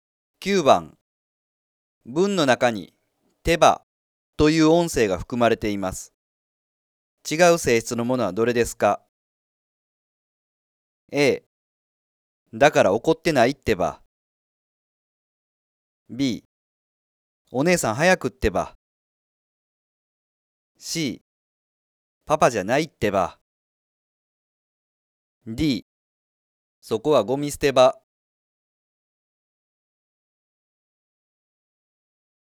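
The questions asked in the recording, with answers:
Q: 文の中に手羽という音声が含まれています。違う性質のものはどれですか?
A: D: そこはゴミ捨て場。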